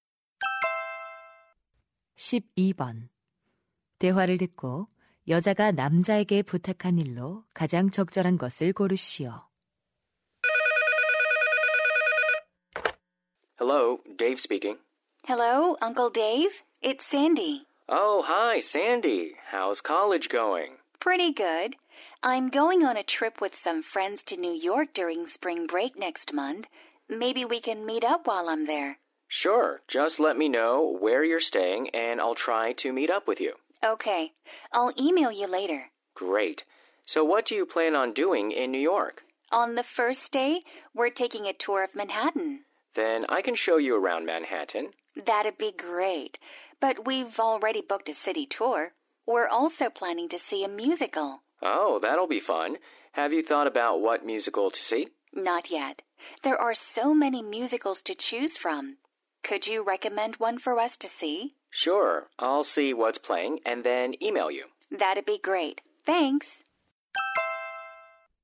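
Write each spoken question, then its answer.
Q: 대화를 듣고 여자가 남자에게 부탁한 일로 가장 적절한 것을 고르시오.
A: 볼 만한 뮤지컬 추천하기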